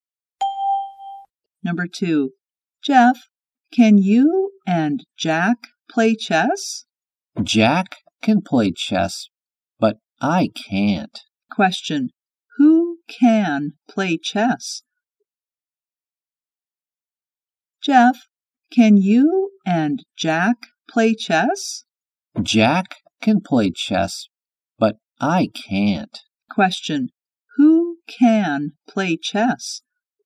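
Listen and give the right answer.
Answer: Jack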